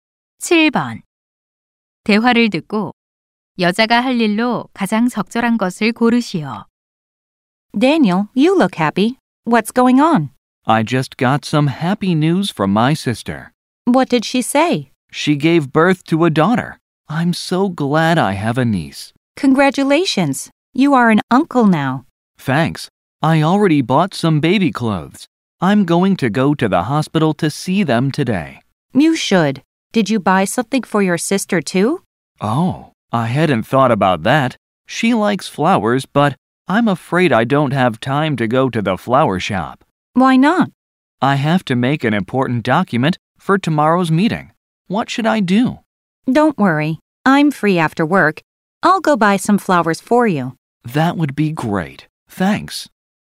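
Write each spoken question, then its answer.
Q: 대화를 듣고 여자가 할 일로 가장 적절한 것을 고르시오.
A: 꽃 사 오기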